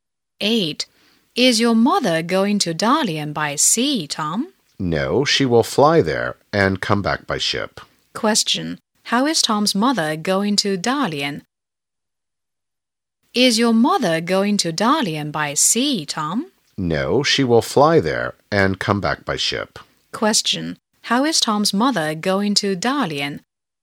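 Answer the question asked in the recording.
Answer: By plane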